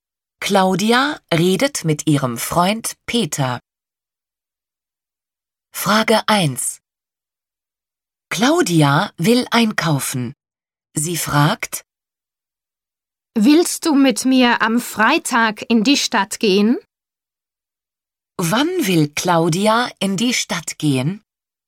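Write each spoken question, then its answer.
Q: Wann will Claudia in die Stadt gehen?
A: Am Freitag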